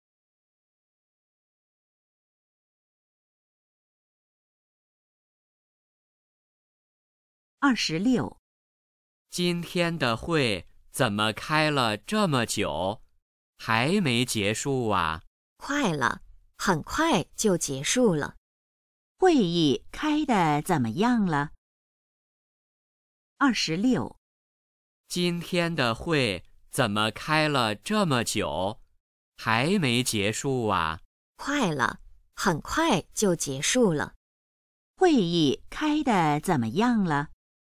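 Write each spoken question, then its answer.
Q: 会议开得怎么样了?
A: 快结束了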